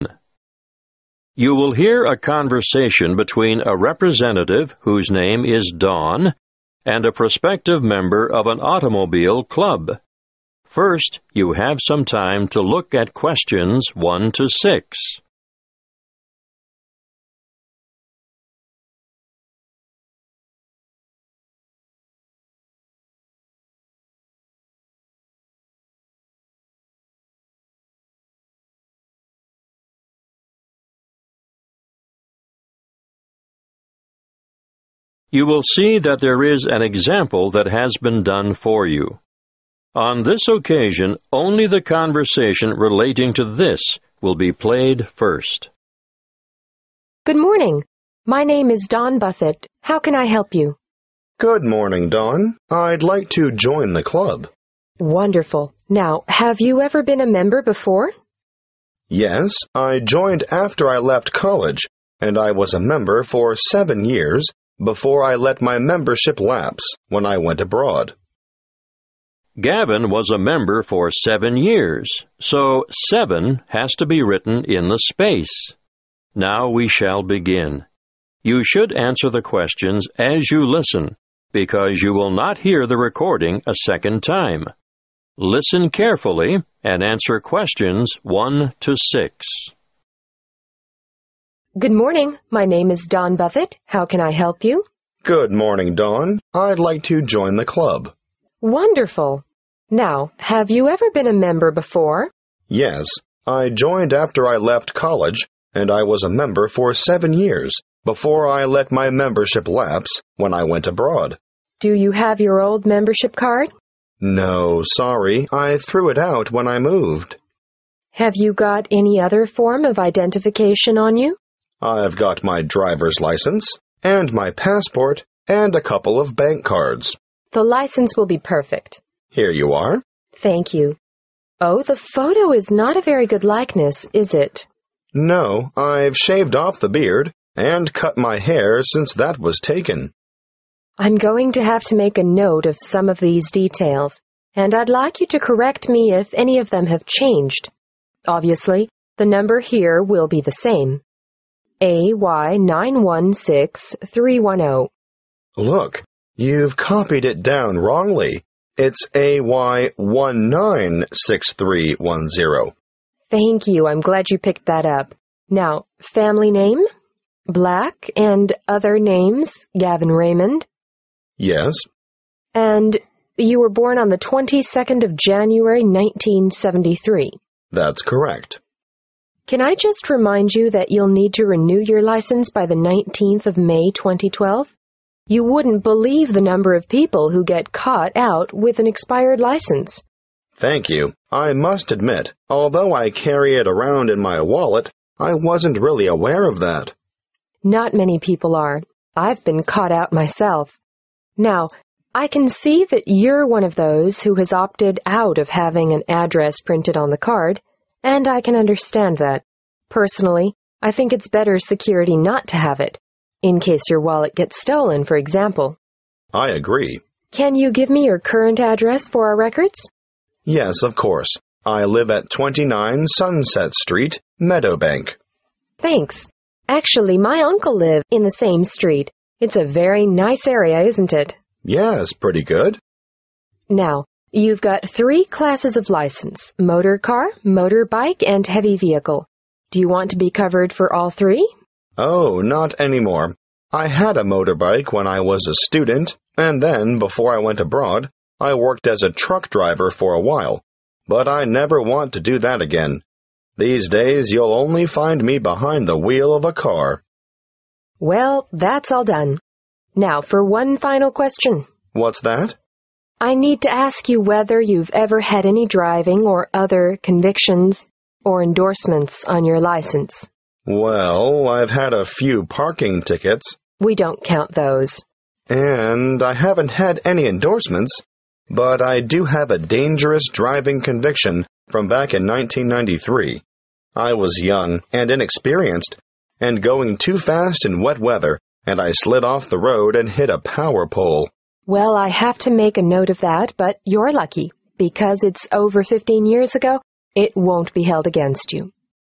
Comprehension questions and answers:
Complete the form below. Write NO MORE THAN TWO WORDS AND/OR A NUMBER for each answer.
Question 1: Type of I.D.: 1. ............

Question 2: I.D. No.: 2. ............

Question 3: I.D. Expiry Date: 3. ............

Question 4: Address: 4. ............ Meadowbank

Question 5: Class of Vehicle: 5. ............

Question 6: Convictions: 6. ............ (1993)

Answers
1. (Drivers) Licence
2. AY 196310
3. 19 May 2012
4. 29 Sunset Street
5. (motor) car
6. dangerous driving